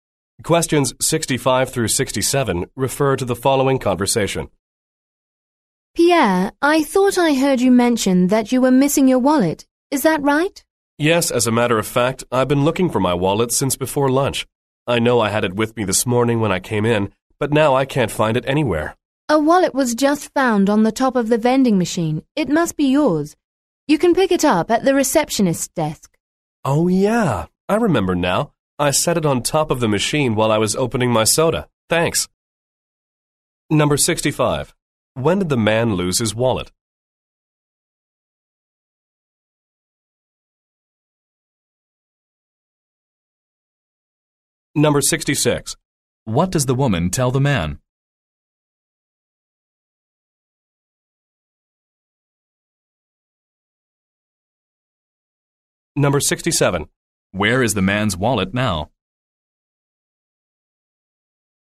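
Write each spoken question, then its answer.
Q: What does the woman tell the man?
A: A wallet was found on top of the vending machine

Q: Where is the man's wallet now?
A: At the receptionist's desk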